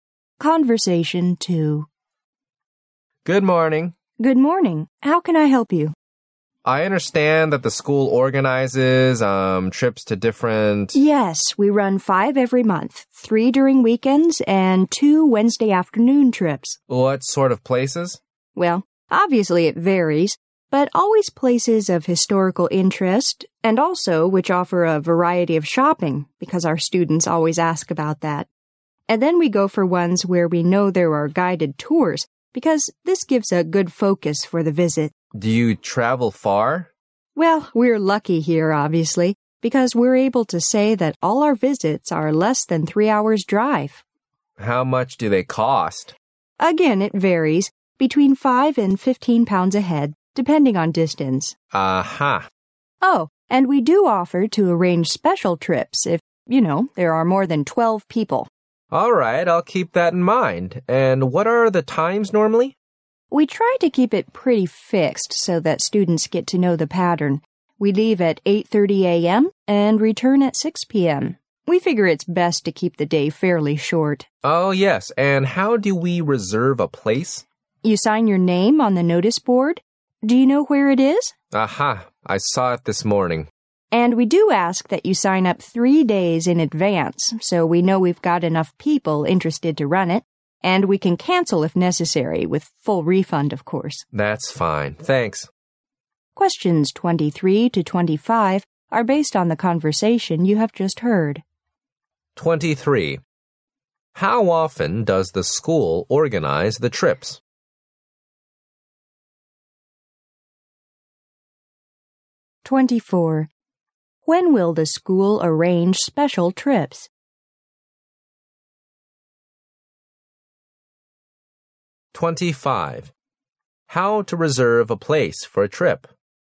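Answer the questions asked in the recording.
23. Five times a month.
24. When there are more than 12 people.
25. Sign your name on the notice board three days in advance.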